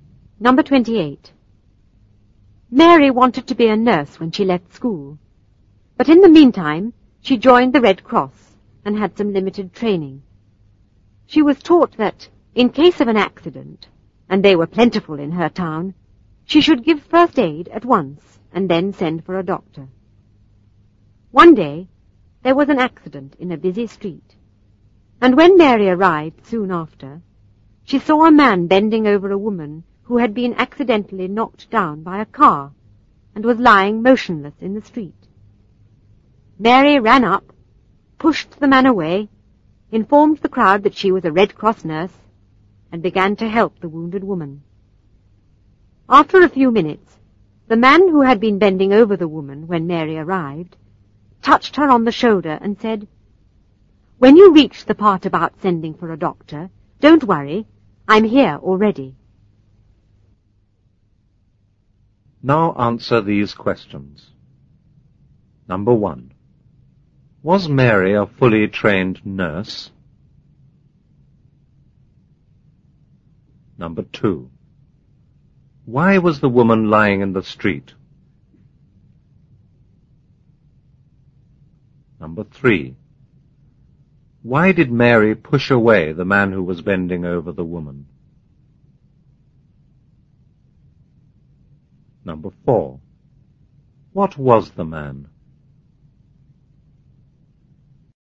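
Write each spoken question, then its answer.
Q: Was Mary a fully trained nurse?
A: No, she had only limited Red Cross training

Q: Why was the woman lying in the street?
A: She had been knocked down by a car

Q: Why did Mary push away the man who was bending over the woman?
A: She wanted to give first aid herself as a Red Cross nurse

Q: What was the man?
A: A doctor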